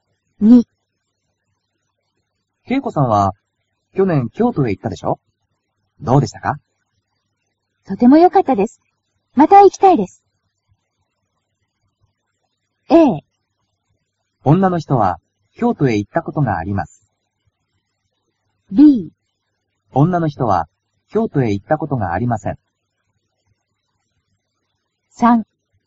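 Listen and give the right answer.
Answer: A: 女の人は、京都へ行ったことがあります。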